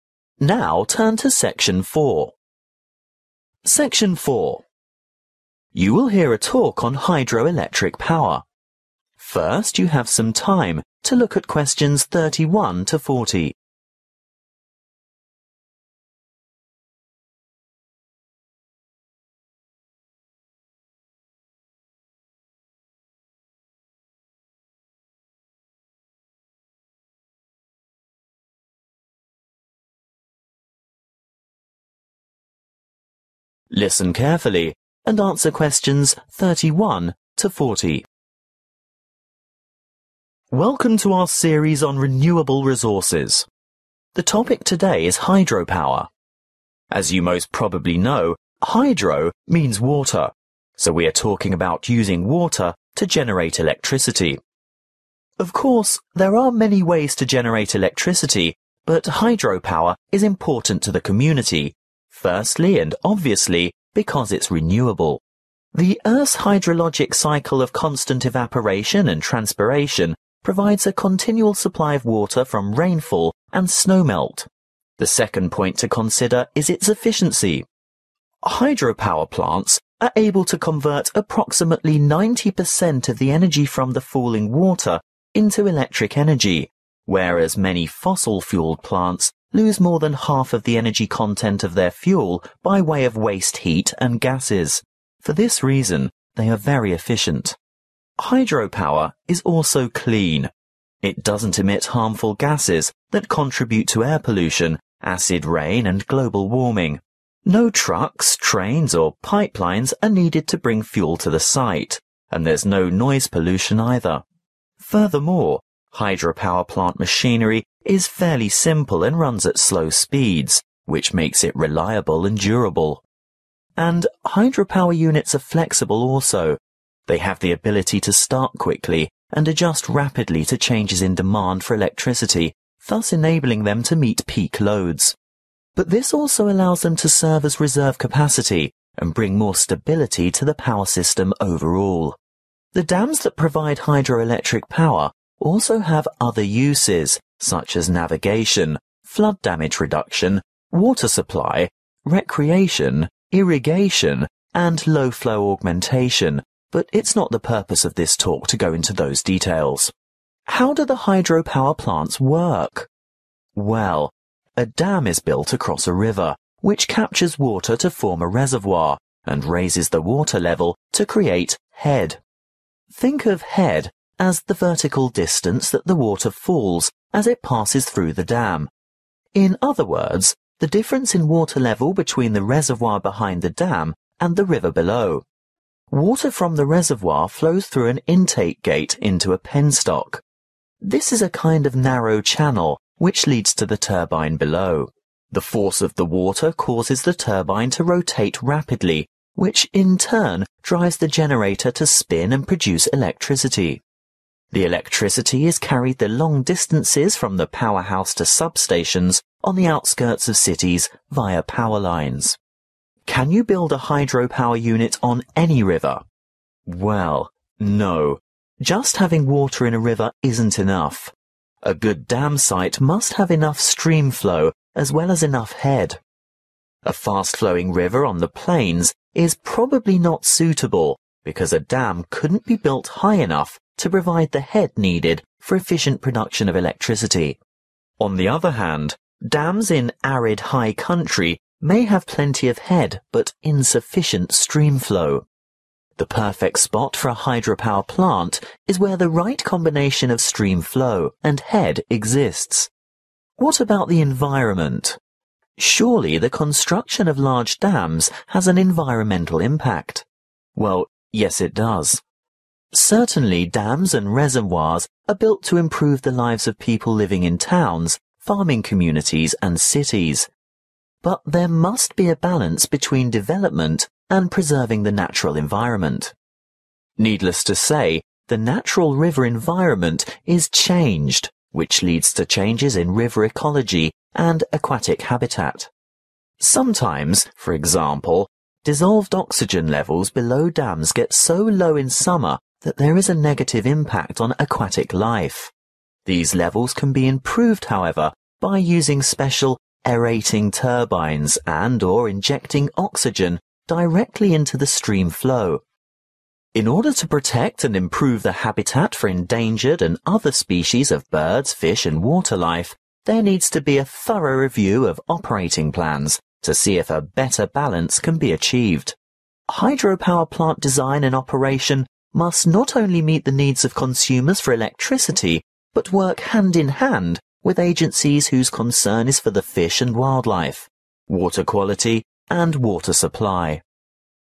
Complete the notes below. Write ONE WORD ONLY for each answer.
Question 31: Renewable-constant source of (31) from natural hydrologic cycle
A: water

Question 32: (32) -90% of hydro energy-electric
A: efficient

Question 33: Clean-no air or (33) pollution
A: noise

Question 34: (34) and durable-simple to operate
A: reliable

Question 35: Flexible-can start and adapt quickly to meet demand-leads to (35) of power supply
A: stability

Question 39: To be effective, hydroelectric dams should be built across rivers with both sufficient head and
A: stream flow

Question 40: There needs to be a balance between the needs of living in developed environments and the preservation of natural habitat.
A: consumers/ people